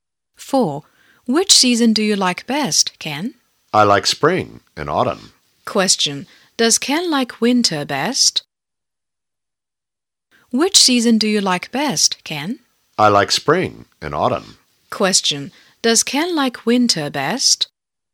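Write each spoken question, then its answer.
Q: Does Ken like winter best?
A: No, he doesn't.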